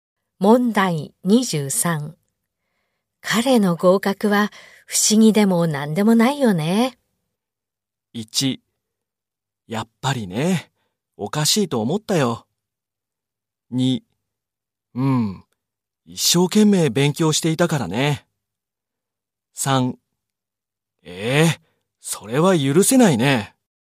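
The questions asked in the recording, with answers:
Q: 彼の合格は不思議でも何でもないよね。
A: 2: 一生懸命勉強していたからね。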